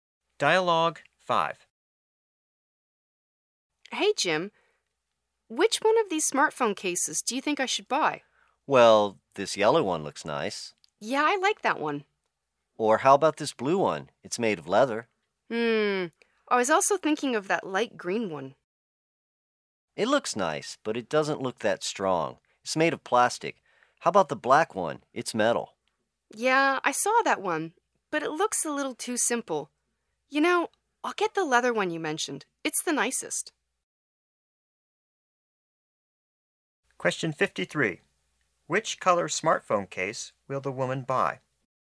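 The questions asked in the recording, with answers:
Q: Which color smartphone case will the woman buy?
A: Blue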